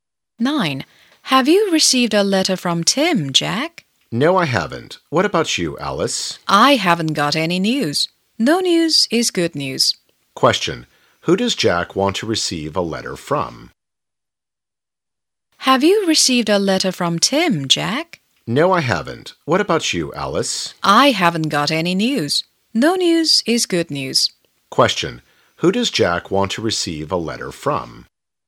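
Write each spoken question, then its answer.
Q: Who does Jack want to receive a letter from?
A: Tim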